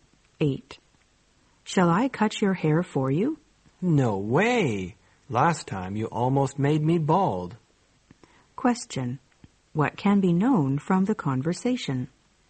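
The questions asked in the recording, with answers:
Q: What can be known from the conversation?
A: The man doesn't want the woman to cut his hair because she did it badly last time.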